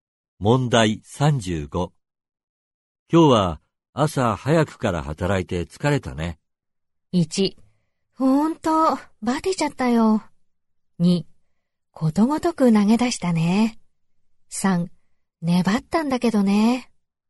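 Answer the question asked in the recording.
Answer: 1: ほんと、バテちゃったよ。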